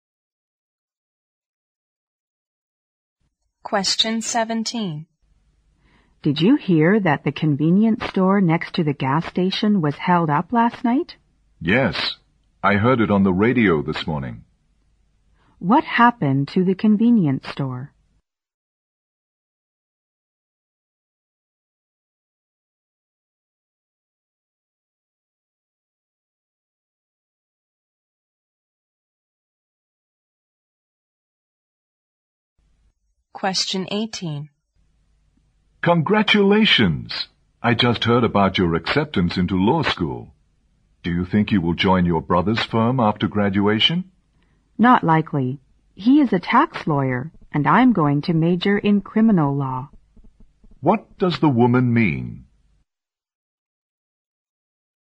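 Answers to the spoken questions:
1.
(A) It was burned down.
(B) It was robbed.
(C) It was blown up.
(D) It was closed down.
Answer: (B) It was robbed.
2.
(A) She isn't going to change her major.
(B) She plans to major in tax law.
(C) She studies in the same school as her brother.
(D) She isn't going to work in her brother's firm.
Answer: (D) She isn't going to work in her brother's firm.

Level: 六级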